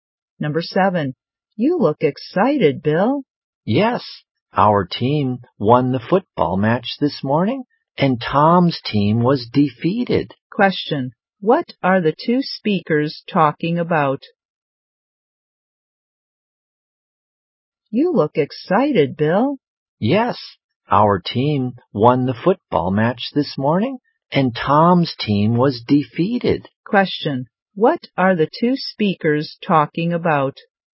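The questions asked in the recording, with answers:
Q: what are the two speakers talking about?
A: A football match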